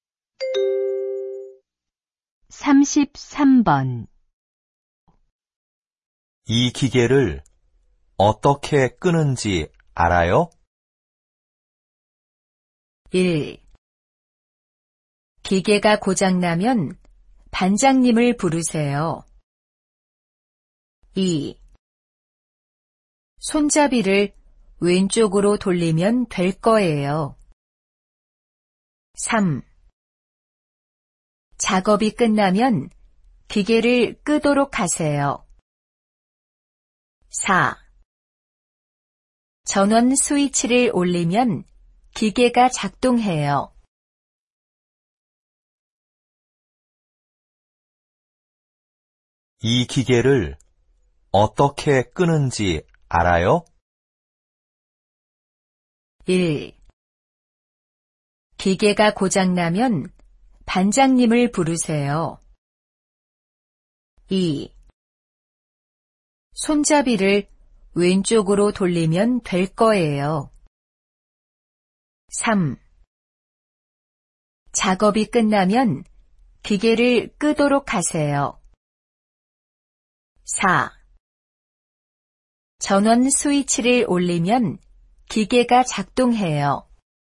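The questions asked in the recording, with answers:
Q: 이 기계를 어떻게 끄는지 알아요?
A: 2: 손잡이를 왼쪽으로 돌리면 될 거예요.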